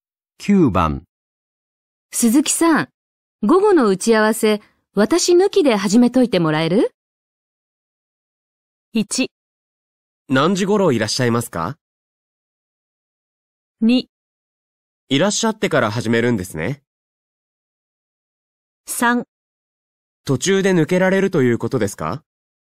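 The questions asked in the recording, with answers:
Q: 鈴木さん、午後の打ち合わせ、私抜きで始めといてもらえる?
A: 1: 何時頃いらっしゃいますか?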